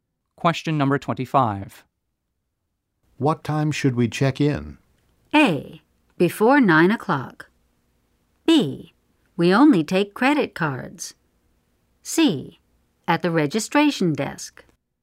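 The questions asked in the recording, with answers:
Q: What time should we check in?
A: A: Before 9 o'clock.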